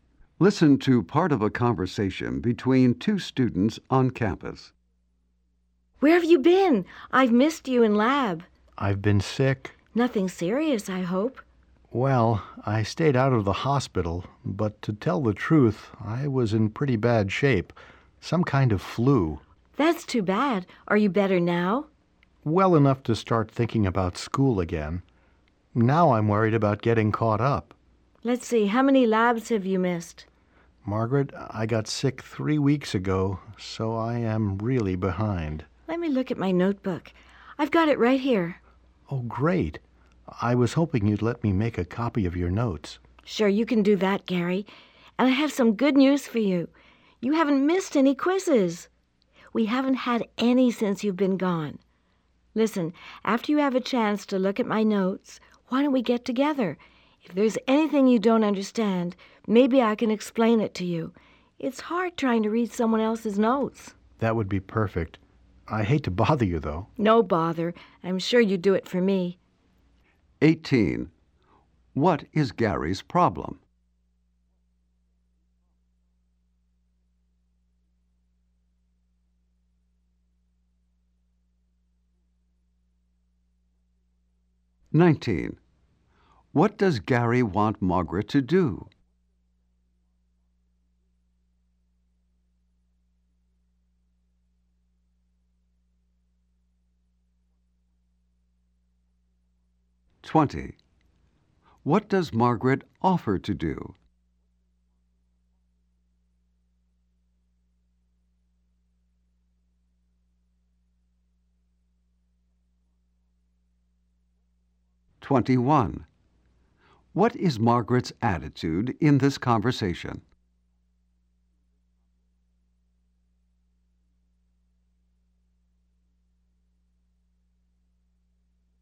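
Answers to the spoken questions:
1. He was sick and missed labs, so he's behind.
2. Let him copy her notes.
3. Get together and explain anything he doesn't understand.
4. Helpful and friendly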